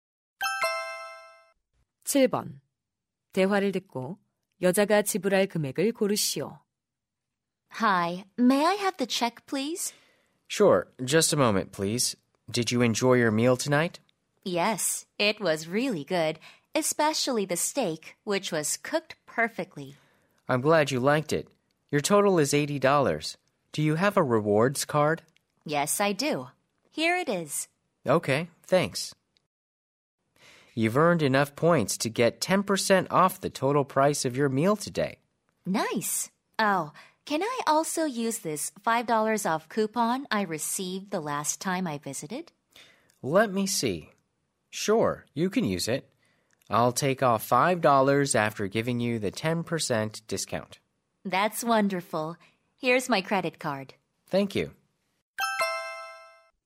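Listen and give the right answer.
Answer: $67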